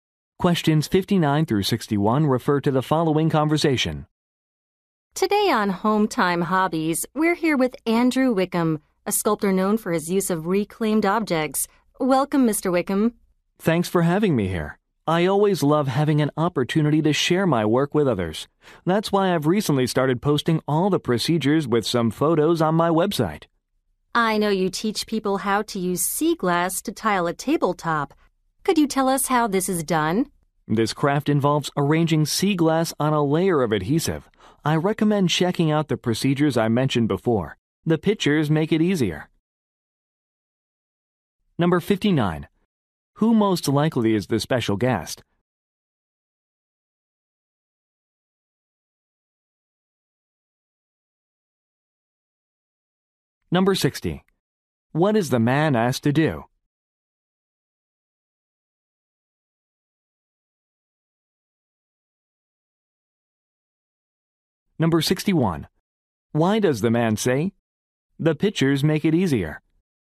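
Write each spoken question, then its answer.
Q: Who most likely is the special guest?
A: A sculptor

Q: What is the man asked to do?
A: Explain how to tile a tabletop with sea glass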